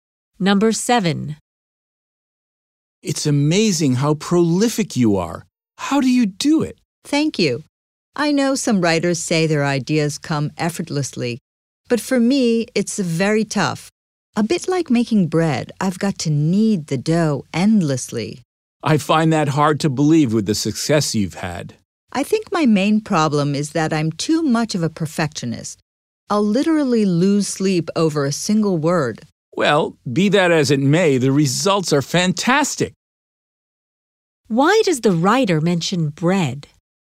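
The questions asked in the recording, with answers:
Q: Why does the writer mention bread?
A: To show that writing is hard work for her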